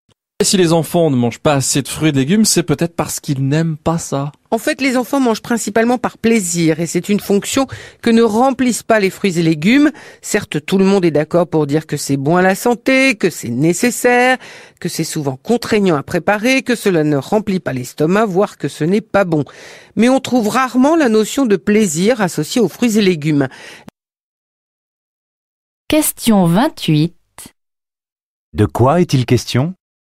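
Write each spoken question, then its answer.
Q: De quoi est-il question ?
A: Du manque de plaisir des enfants à manger des fruits et des légumes.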